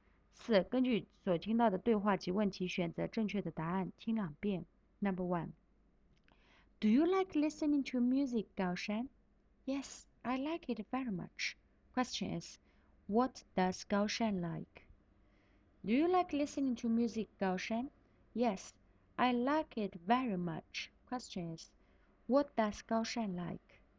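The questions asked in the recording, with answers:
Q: what does Gao Shan like?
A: Listening to music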